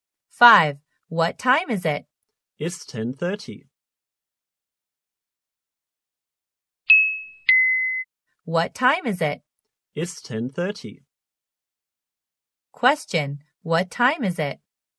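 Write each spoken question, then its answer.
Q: What time is it?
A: 10:30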